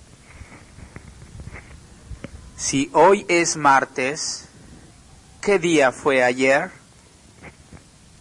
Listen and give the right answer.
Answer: Fue lunes.